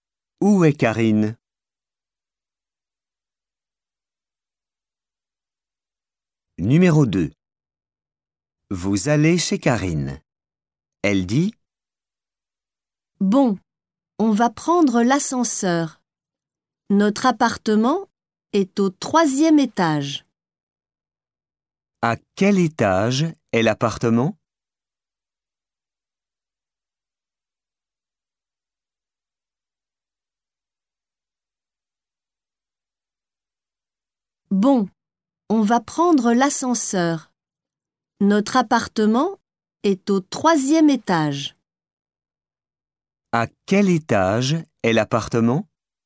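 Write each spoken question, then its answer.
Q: À quel étage est l'appartement?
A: Au 3e étage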